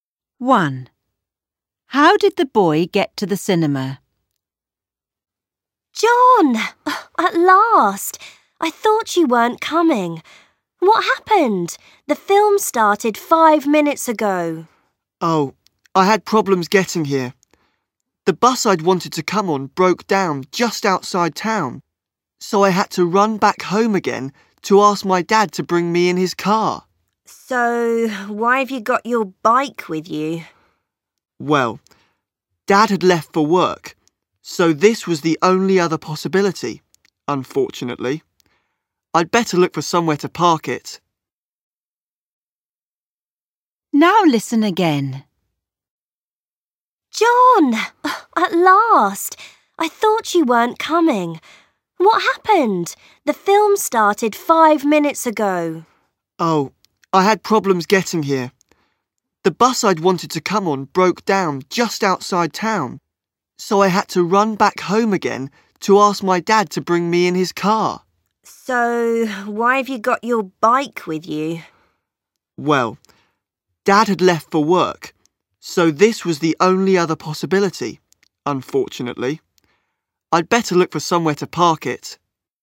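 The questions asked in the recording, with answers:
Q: How did the boy get to the cinema?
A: By bike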